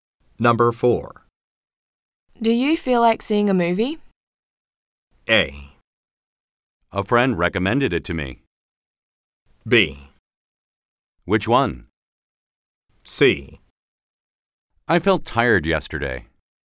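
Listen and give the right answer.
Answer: B: Which one?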